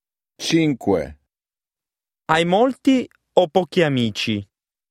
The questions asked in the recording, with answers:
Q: Hai molti o pochi amici?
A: Cinzia.